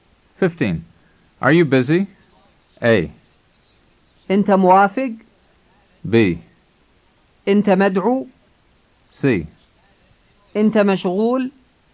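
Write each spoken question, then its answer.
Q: Are you busy?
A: C: أنت مشغول؟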